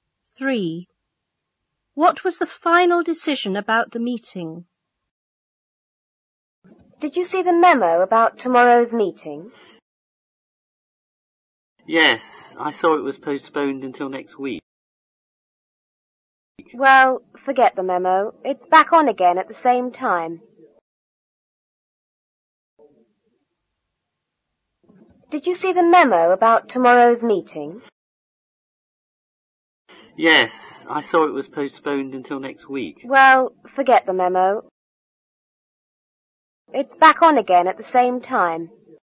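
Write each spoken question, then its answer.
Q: What was the final decision about the meeting?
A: It is back on at the same time (tomorrow)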